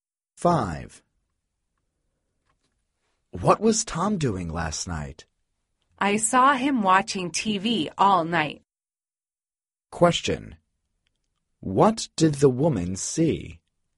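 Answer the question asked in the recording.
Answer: Tom watching TV all night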